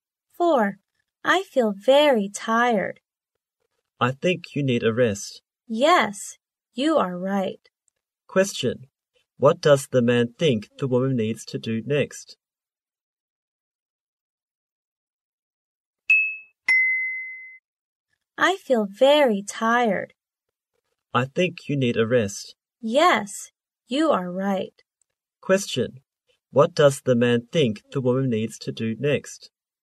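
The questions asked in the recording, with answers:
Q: What does the man think the woman needs to do next?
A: Have a rest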